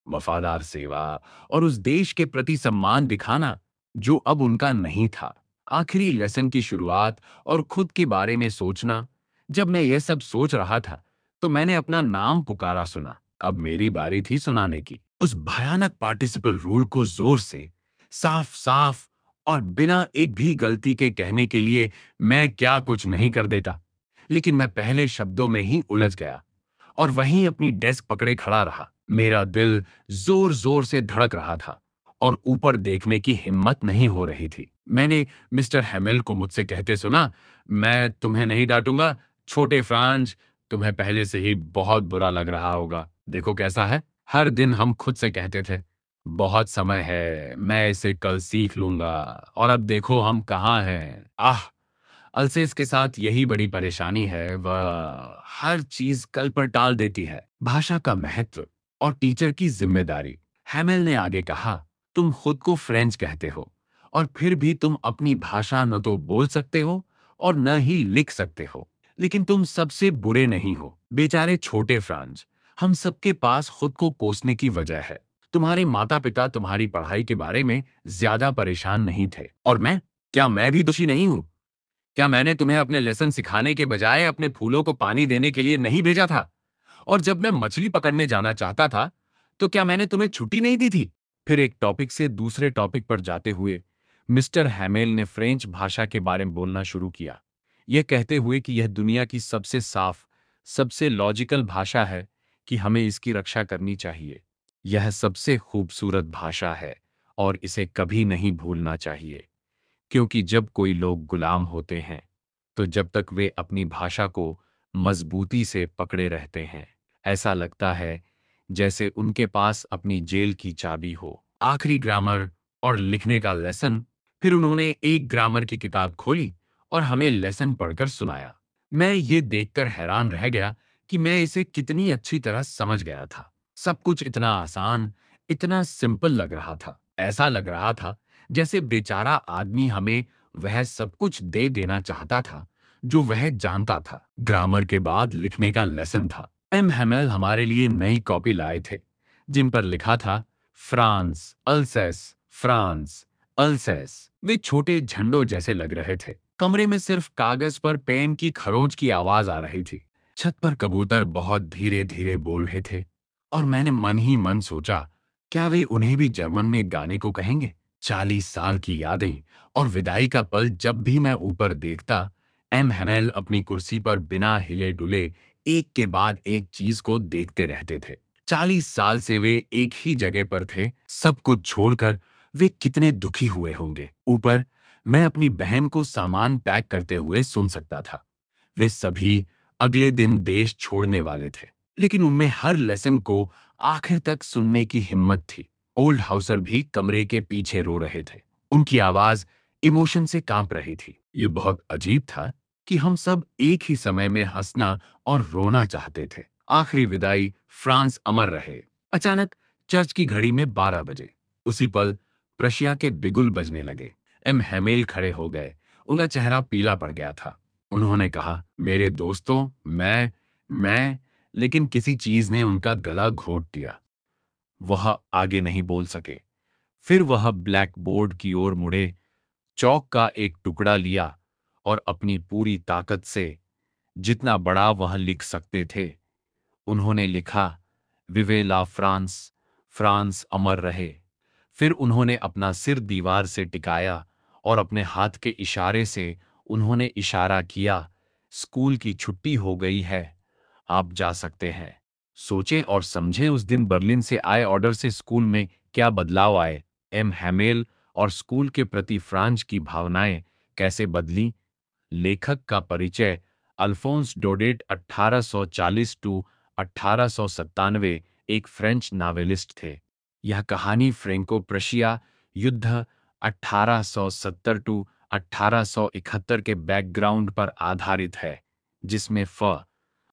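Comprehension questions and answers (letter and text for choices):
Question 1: For how many years had M. Hamel served the school?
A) 10 years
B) 20 years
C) 30 years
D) 40 years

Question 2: M. Hamel called the French language the most ______ in the world.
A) Difficult and confusing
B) Beautiful, clearest, and most logical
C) Ancient and respected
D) Easy to learn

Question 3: What did M. Hamel write on the blackboard at the end of the lesson?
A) "Long Live Germany"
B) "Goodbye, Students"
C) "Vive La France!"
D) "The End"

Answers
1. D) 40 years
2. B) Beautiful, clearest, and most logical
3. C) "Vive La France!"

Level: Class 12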